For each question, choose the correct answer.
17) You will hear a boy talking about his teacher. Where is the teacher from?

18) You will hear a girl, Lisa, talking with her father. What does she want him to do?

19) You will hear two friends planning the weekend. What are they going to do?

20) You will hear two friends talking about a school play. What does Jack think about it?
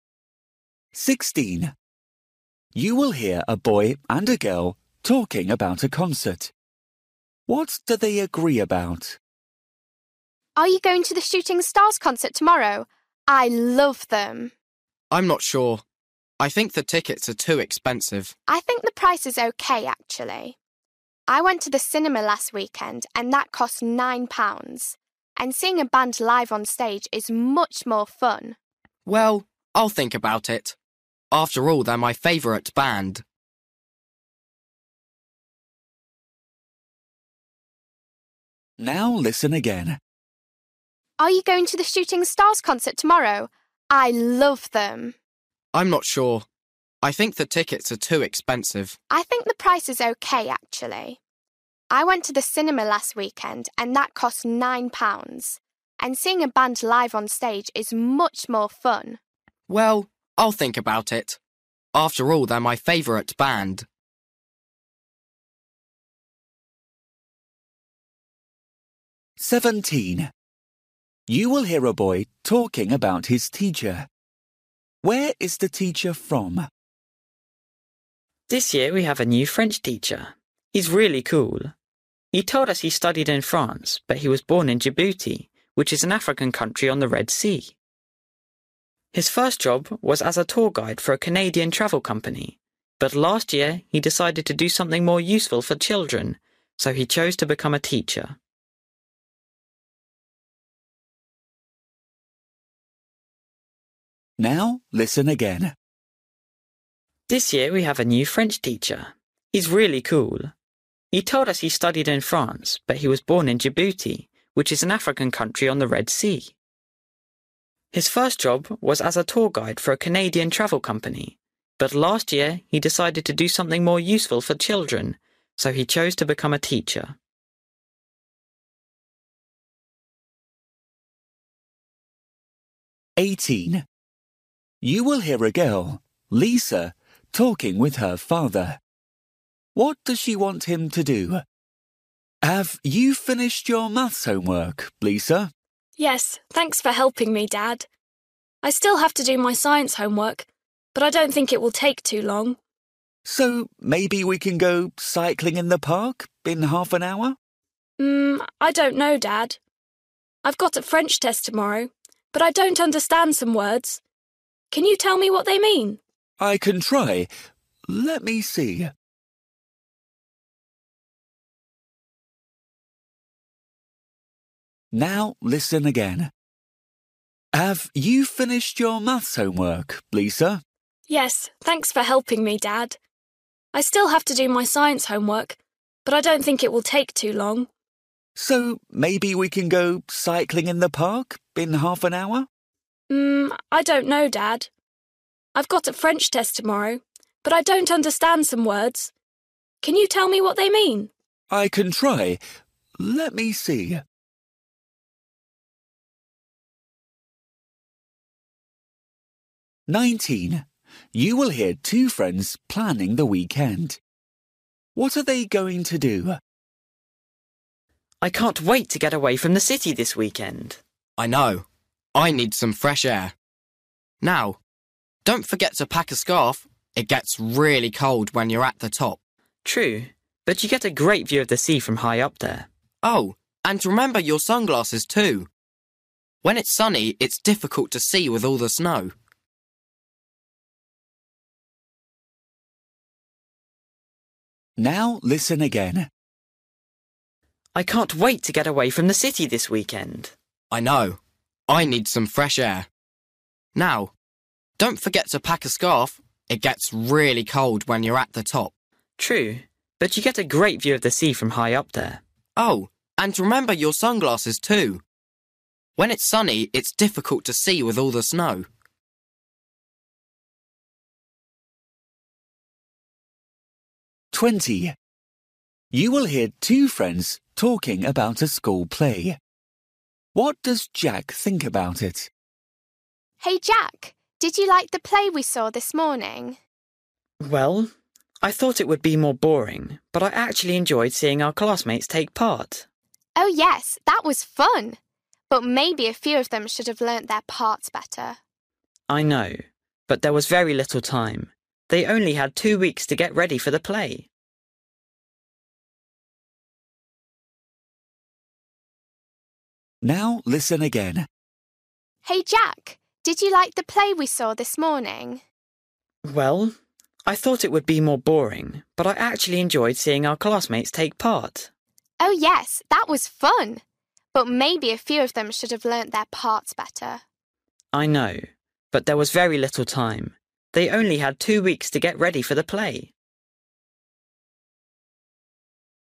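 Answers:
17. Djibouti
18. Help her with French words for her test
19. Go up a snowy mountain
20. It was better than he expected; he enjoyed seeing his classmates in it

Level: Luyện nghe trình độ A2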